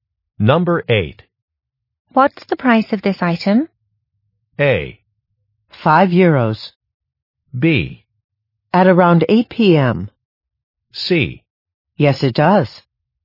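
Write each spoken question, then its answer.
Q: What's the price of this item?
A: A: 5 euros.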